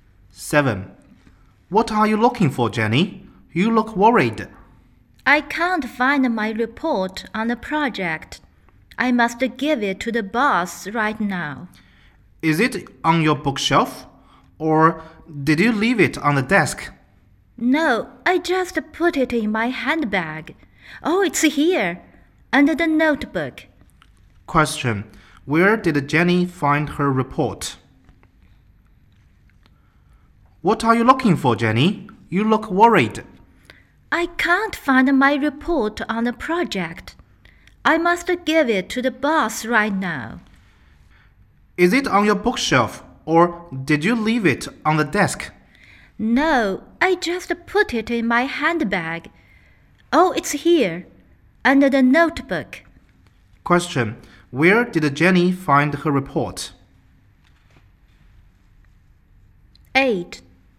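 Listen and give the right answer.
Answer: In her handbag, under the notebook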